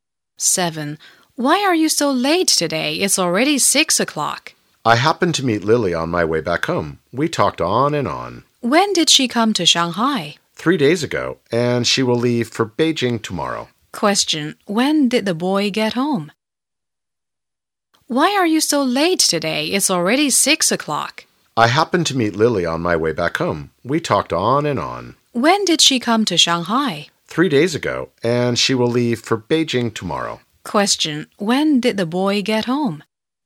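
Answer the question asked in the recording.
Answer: At 6 o'clock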